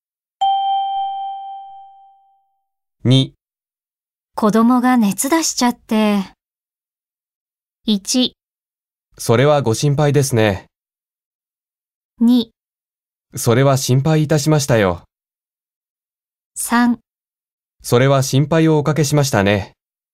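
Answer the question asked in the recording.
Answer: 1: それはご心配ですね。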